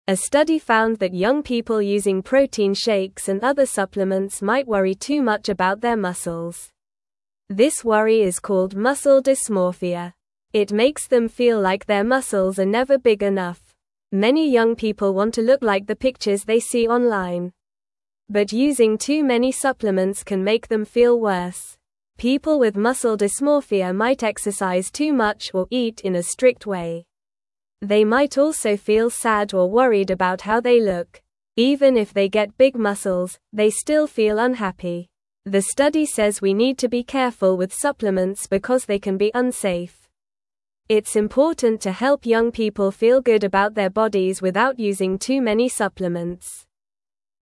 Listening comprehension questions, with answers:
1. A study found that young people using protein shakes and other supplements might (1)______ too much about their (2)______.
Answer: worry

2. A study found that young people using protein shakes and other supplements might (1)______ too much about their (2)______.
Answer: muscles

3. (3)______ young people want to look like the pictures they see online.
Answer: Many

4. But using too many (4)______ can make them feel worse.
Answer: supplements

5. People with muscle dysmorphia might (5)______ too much or eat in a (6)______ way.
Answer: exercise

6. People with muscle dysmorphia might (5)______ too much or eat in a (6)______ way.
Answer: strict

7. It's important to help young people feel good about their bodies without (7)______ too (8)______ supplements.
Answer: using

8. It's important to help young people feel good about their bodies without (7)______ too (8)______ supplements.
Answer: many

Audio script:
A study found that young people using protein shakes and other supplements might worry too much about their muscles. This worry is called muscle dysmorphia. It makes them feel like their muscles are never big enough. Many young people want to look like the pictures they see online. But using too many supplements can make them feel worse.
People with muscle dysmorphia might exercise too much or eat in a strict way. They might also feel sad or worried about how they look. Even if they get big muscles, they still feel unhappy. The study says we need to be careful with supplements because they can be unsafe. It's important to help young people feel good about their bodies without using too many supplements.

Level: Level 1